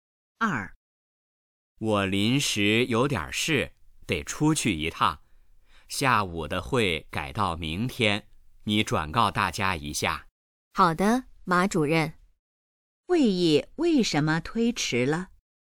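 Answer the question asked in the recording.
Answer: 马主任临时有事要出去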